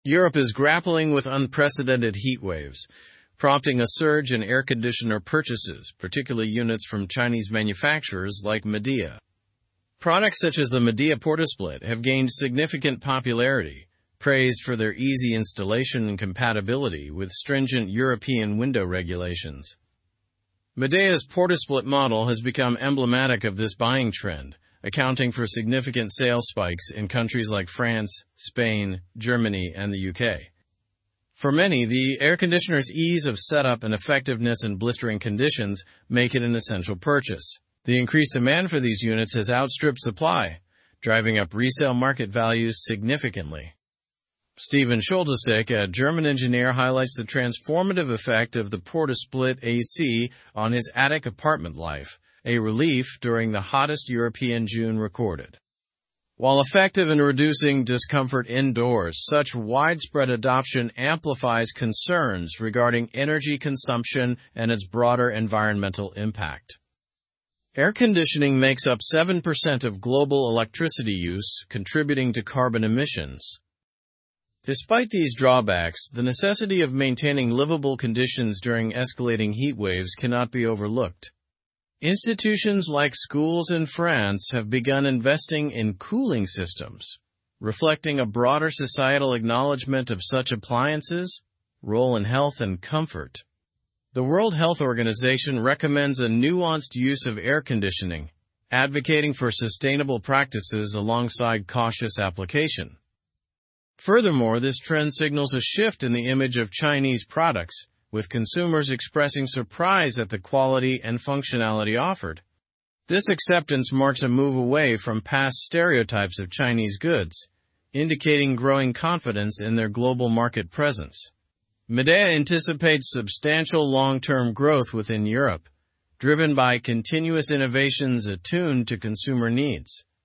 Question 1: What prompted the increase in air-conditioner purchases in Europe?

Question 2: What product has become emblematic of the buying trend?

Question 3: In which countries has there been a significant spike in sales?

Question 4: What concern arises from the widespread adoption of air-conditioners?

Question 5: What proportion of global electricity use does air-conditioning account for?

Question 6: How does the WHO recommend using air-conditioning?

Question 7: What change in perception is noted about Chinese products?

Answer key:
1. Heatwaves prompted the increase in air-conditioner purchases.
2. The Midea PortaSplit has become emblematic of the buying trend.
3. There has been a significant spike in sales in France, Spain, Germany, and the UK.
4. There is concern about the increased energy consumption and environmental impact.
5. Air-conditioning accounts for 7% of global electricity use.
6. The WHO recommends a nuanced use of air-conditioning with sustainable practices.
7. Consumers are expressing surprise at the quality and functionality of Chinese products.

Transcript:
Europe is grappling with unprecedented heatwaves, prompting a surge in air-conditioner purchases, particularly units from Chinese manufacturers like Midea. Products such as the Midea PortaSplit have gained significant popularity, praised for their easy installation and compatibility with stringent European window regulations.
Midea's PortaSplit model has become emblematic of this buying trend, accounting for significant sales spikes in countries like France, Spain, Germany, and the UK. For many, the air-conditioner's ease of setup and effectiveness in blistering conditions make it an essential purchase. The increased demand for these units has outstripped supply, driving up resale market values significantly.
Steven Scholtysek, a German engineer, highlights the transformative effect of the PortaSplit AC on his attic apartment life, a relief during the hottest European June recorded. While effective in reducing discomfort indoors, such widespread adoption amplifies concerns regarding energy consumption and its broader environmental impact. Air-conditioning makes up 7% of global electricity use, contributing to carbon emissions.
Despite these drawbacks, the necessity of maintaining livable conditions during escalating heatwaves cannot be overlooked. Institutions like schools in France have begun investing in cooling systems, reflecting a broader societal acknowledgment of such appliances' role in health and comfort. The World Health Organization recommends a nuanced use of air-conditioning, advocating for sustainable practices alongside cautious application.
Furthermore, this trend signals a shift in the image of Chinese products, with consumers expressing surprise at the quality and functionality offered. This acceptance marks a move away from past stereotypes of Chinese goods, indicating growing confidence in their global market presence. Midea anticipates substantial long-term growth within Europe, driven by continuous innovations attuned to consumer needs.

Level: Level 4